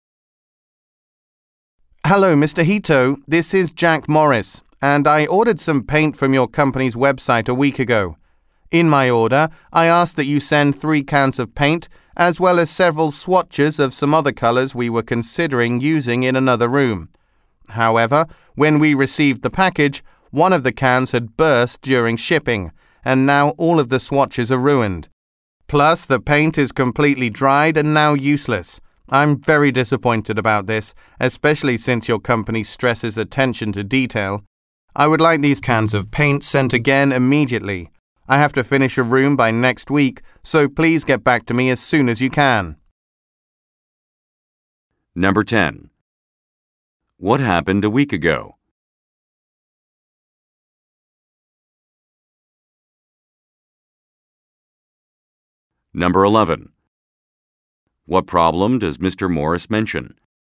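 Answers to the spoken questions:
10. Mr. Morris ordered paint from the company's website.
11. A paint can burst during shipping, ruining the swatches and the paint.
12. Send the cans of paint again immediately.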